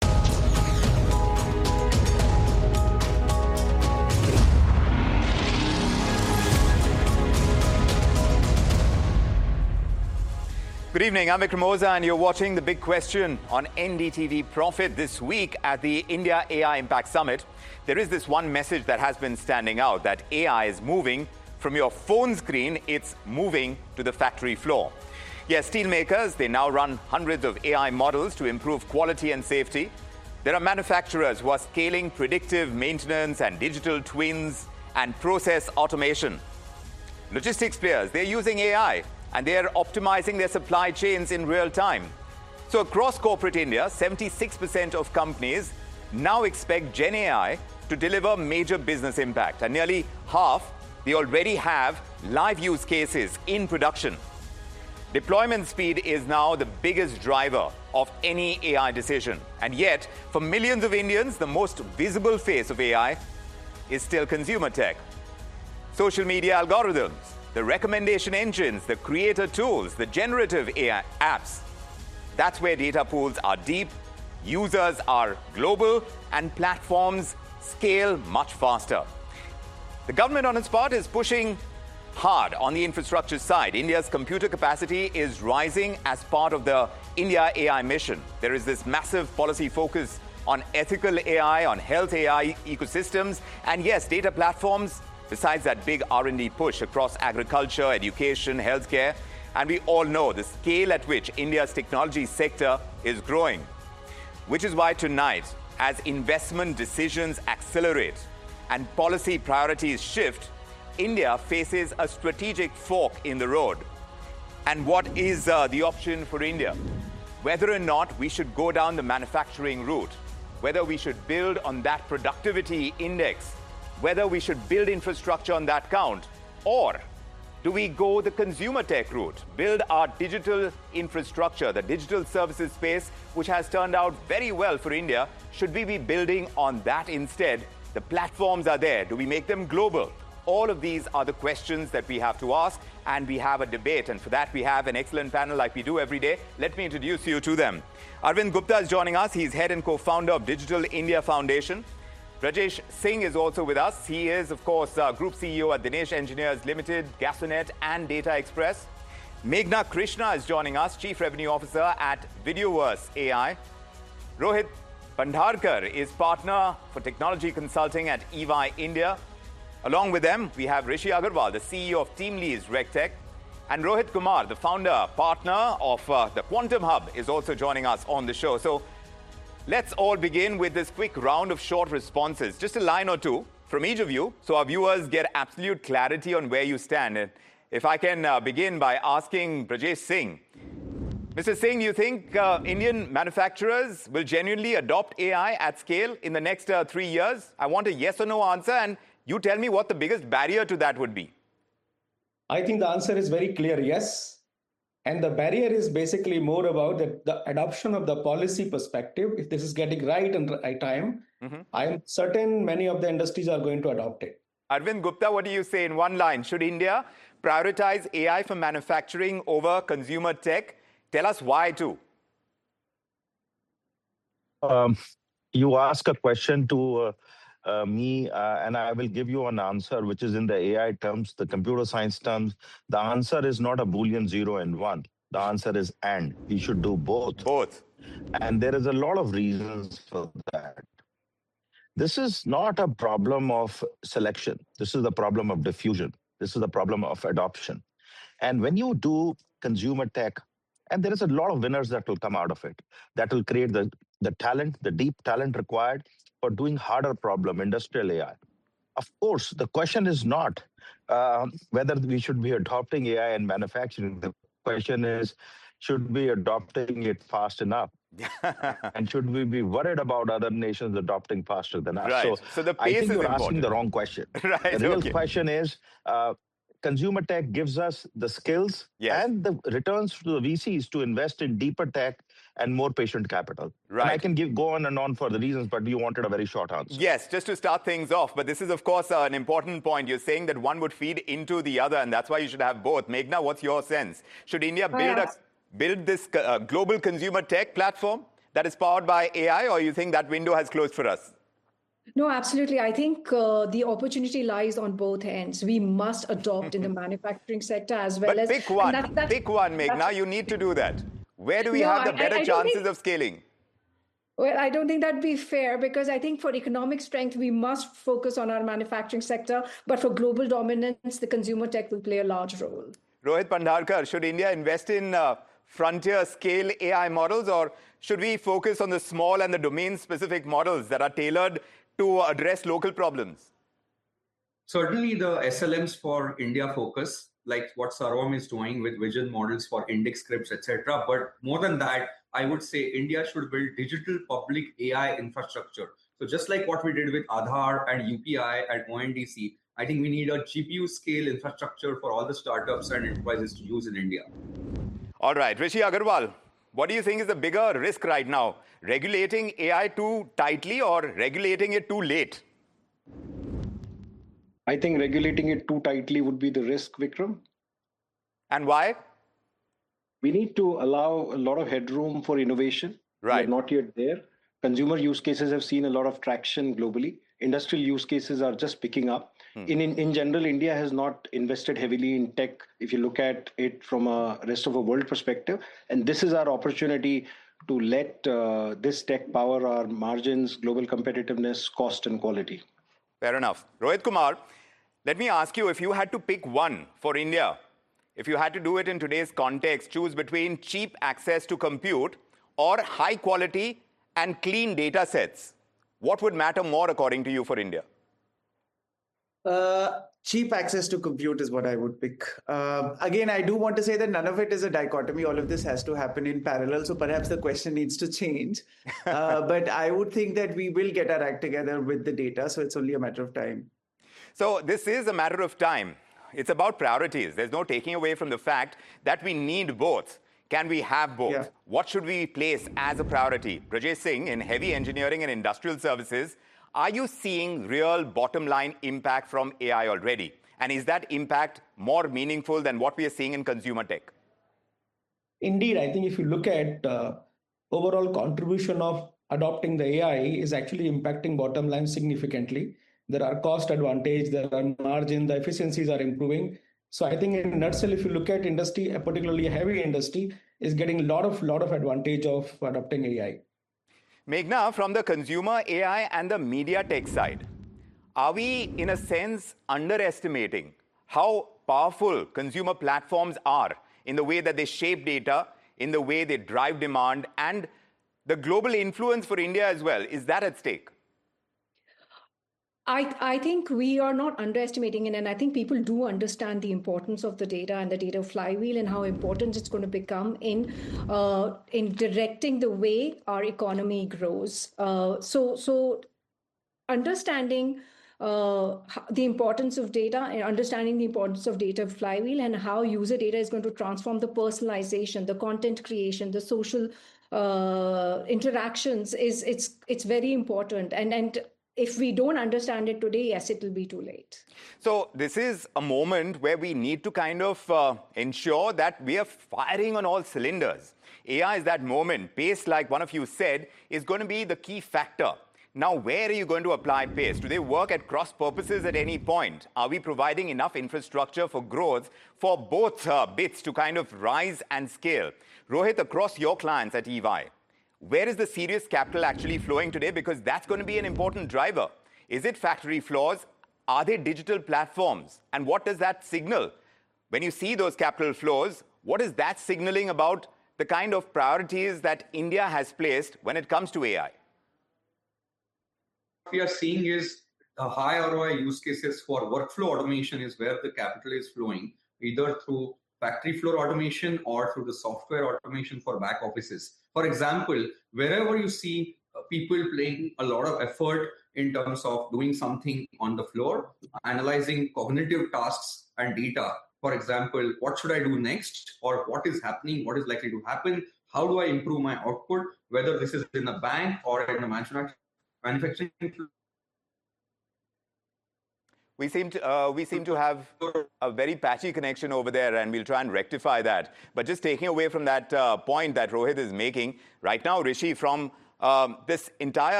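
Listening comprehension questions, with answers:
用 1-2 句话用自己的话回答下面的问题。点「✨ AI 判断」后,AI 会对照当天 transcript 给出参考要点与评分。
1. According to the opening, what percentage of Indian companies expect GenAI to deliver major business impact, and what do nearly half of them already have?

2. In the panel introduction, what are the names and titles of the two Rohits mentioned?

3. When asked if Indian manufacturers will adopt AI at scale in the next 3 years, what was Raj Singh's answer and what did he say was the biggest barrier?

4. Rohit Kumar, when forced to choose between cheap access to compute or high-quality clean data, which did he pick and what was his reasoning about the other option?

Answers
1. 76%; nearly half already have live use cases in production.
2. Rohit Bandharkar, Partner for Technology Consulting at EY India; Rohit Kumar, founder partner of The Quantum Hub.
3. A clear yes; the barrier is adoption from the policy perspective (getting policy right at the right time).
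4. Cheap access to compute; he believes India will get its act together on data, so it is only a matter of time (and both must happen in parallel).

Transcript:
Good evening, I'm Vikram Oza and you're watching The Big Question on NDTV Prophet this week
at the India AI Impact Summit.
There is this one message that has been standing out, that AI is moving from your phone screen,
it's moving to the factory floor.
Yes, steel makers, they now run hundreds of AI models to improve quality and safety.
There are manufacturers who are scaling predictive maintenance and digital twins and process
automation.
Logistics players, they're using AI.
And they're optimizing their supply chains in real time.
So across corporate India, 76% of companies now expect Gen AI to deliver major business
impact and nearly half they already have live use cases in production.
Deployment speed is now the biggest driver of any AI decision and yet for millions
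of Indians the most visible face of AI is still consumer tech.
Media algorithms, the recommendation engines, the creator tools, the generative AI apps.
That's where data pools are deep, users are global and platforms scale much faster.
The government on its part is pushing hard on the infrastructure side.
India's computer capacity is rising as part of the India AI mission.
There is this massive policy focus on ethical AI, on health AI ecosystems.
And yes, data platforms besides that big R&D push across agriculture, education, healthcare
and we all know the scale at which India's technology sector is growing.
There is this massive policy focus on ethical AI on health AI ecosystems and yes data platforms besides that big R&D push across agriculture education healthcare and we all know the scale at which India's technology sector is growing which is why tonight as investment decisions accelerate and policy priorities shift India faces a strategic fork in the road and what is uh the option for India whether or or not we should go
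And we all know the scale at which India's technology sector is growing, which is why tonight, as investment decisions accelerate and policy priorities shift, India faces a strategic fork in the road.
And what is the option for India?
Whether or not we should go down the manufacturing route?
Whether we should build on that productivity index, whether we should build infrastructure on that count or do we go the consumer tech route, build our digital infrastructure, the digital services space, which has turned out very well for India?
Should we be building on that instead?
The platforms are there.
Do we make them global?
All of these are the questions that we have to ask and we have a debate.
And for that we have an excellent panel like we do every day.
Let me introduce you to them.
Arvind Gupta is joining us.
He is head and co founder of Digital India Foundation.
Rajesh Singh is also with us.
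He is of course Group CEO at Dinish Engineers Limited, Gasonet and Data Express.
Meghna Krishna is joining us, Chief Revenue officer at Videoverse AI.
Rohit Bandarkar is partner for technology consulting at Evi India.
Along with them, we have Rishi Aggarwal, the CEO of Teamlease Regtech and Rohit Kumar, the founder partner of the Quantum Hub is also joining us on the show.
So let's all begin with this quick round of short responses, just a line or two from each of you so our viewers get absolute clarity on where you stand.
And if I can begin by asking Prajesh Singh.
Mr Singh, you think Indian manufacturers will genuinely adopt AI at scale in the next three years?
I want a yes or no answer and you tell me what the biggest barrier to that would be.
I think the answer is very clear, yes.
And the barrier is basically more about that the adoption of the policy perspective.
If this is getting right and right time, I'm certain many of the industries are going to adopt it.
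Arvind Gupta, what do you say in one line, should India prioritize AI for manufacturing over consumer tech?
Tell us why, too.
You ask a question to me and I will give you an answer, which is, in the AI terms, the computer science terms, the answer is not a boolean, 0 and 1.
The answer is, and you should do both, both.
And there is a lot of reasons for that.
This is not a problem of selection.
This is a problem of diffusion.
This is a problem of adoption.
And when you do consumer tech and there is a lot of winners that will come out of it, that will create the, the talent, the deep talent required for doing harder problem industrial AI.
Of course, the question is not whether we should be adopting AI and manufacturing.
The question is, should be adopting it fast enough and should we be worried about other nations adopting faster than us?
So, so the pace is asking the wrong question.
The real question is, uh, consumer tech gives us the skills and the returns to the vcs to invest in deeper tech and more patient capital, right?
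I can give go on and on for the reasons, but you wanted a very short answer.
Yes, just to start things off.
But this is, of course, an important point.
You're saying that one would feed into the other and that's why you should have both.
Magna, what's your sense?
Should India build us build this global consumer tech platform that is powered by AI or you think that window has closed for us?
No, absolutely.
I think the opportunity lies on both ends.
We must adopt in the manufacturing sector as well.
But pick one, pick one, Magna.
You need to do that.
Where do we have the better chances of scaling?
Well, I don't think that'd be fair because I think for economic strength, we must focus on our manufacturing sector.
But for global dominance, the consumer, tech will play a large role.
Rohit Pandharkar, should India invest in frontier scale AI models or should we focus on the small and the domain specific models that are tailored to address local problems?
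Certainly the SLMs for India focus like what Sarom is doing with vision models for index scripts, etc.
But more than that, I would say India should build digital public AI infrastructure.
So just like what we did with Adhar and UPI and ONDC, I think we need a GPU scale infrastructure for all the startups and enterprises to use in India.
All right, Rishi Aggarwal, what do you think is the bigger risk right now?
Regulating AI too tightly or regulating it too late?
I think regulating it too tightly would be the risk, Vikram, and why we need to allow a lot of headroom for innovation, right?
Not yet there.
Consumer use cases have seen a lot of traction globally.
Industrial use cases are just picking up in, in.
In general, India has not invested heavily in tech.
If you look at it from a rest of a world perspective, and this is our opportunity to let this tech power our margins, global competitiveness, cost and quality.
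Fair enough.
Rohit Kumar, let me ask you, if you had to pick one for India, if you had to do it in today's context, choose between cheap access to compute or high quality and clean data sets.
What would matter more according to you, for India?
Cheap access to computer is what I would pick.
Again, I do want to say that none of it is a dichotomy.
All of this has to happen in parallel.
So perhaps the question needs to change.
But I would think that we will get our act together with the data, so it's only a matter of time.
So this is a matter of time.
It's about priorities.
There's no taking away from the fact that we need both.
Can we have both?
What should we place as a priority?
Rajasingh in heavy engineering and industrial services?
Are you seeing real bottom line impact from AI already?
And is that impact more meaningful than what we are seeing in consumer tech?
Indeed, I think if you look at overall contribution of adopting the AI is actually impacting bottom line significantly.
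There are cost advantage, there are margin.
The efficiencies are improving.
So I think in nutshell, if you look at industry, a particularly heavy industry is getting a lot of, lot of advantage of adopting AI Magna from the consumer AI and the media tech side.
Are we in a sense underestimating how powerful consumer platforms are in the way that they shape data, in the way they drive demand and the global influence for India as well.
Is that at stake?
I think we are not underestimating it and I think people do understand the importance of the data and the data flywheel and how important it's going to become in, uh, in directing the way our economy grows.
Uh, so, so understanding, uh, how the importance of data and understanding the importance of data flywheel and how user data is going to transform the personalization, the content creation, the social, uh, interactions is, it's, it's very important.
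And, and if we don't understand it today, yes, it will be too late.
So this is a moment where we need to kind of ensure that we are firing on all cylinders.
AI is that moment pace, like one of you said is going to be the key factor.
Now where are you going to apply pace?
Do they work at cross purposes at any point?
Are we providing enough infrastructure for growth for both bits to kind of rise and scale.
Rohit, across your clients at Evi, where is the serious capital actually flowing today?
Because that's going to be an important driver.
Is it factory floors?
Are they digital platforms?
And what does that signal?
When you see those capital flows, what is that signaling about the kind of priorities that India has placed when it comes to AI?
We are seeing is a high ROI use cases for workflow automation is where the capital is flowing either through factory floor automation or through the software automation for back offices, for example, wherever you see people playing.
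A lot of effort in terms of doing something on the floor, analyzing cognitive tasks and data, for example, what should I do next?
Or what is happening, what is likely to happen, how do I improve my output, whether this is in the bank or in the manufacturing.
Manufacturing, we seem to, uh, we seem to have a very patchy connection over there and we'll try and rectify that.
But just taking away from that point that Rohit is making right now, Rishi, from this entire.

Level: CEFRB2-C1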